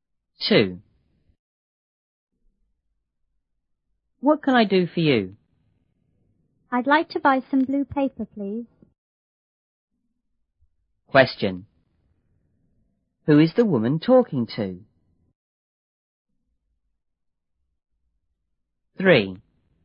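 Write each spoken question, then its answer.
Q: Who is the woman talking to?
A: A shop assistant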